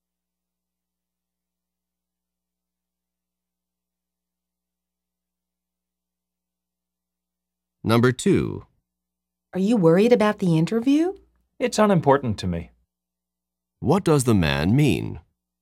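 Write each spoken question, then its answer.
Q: What does the man mean?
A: He isn't worried about the interview; it doesn't matter to him.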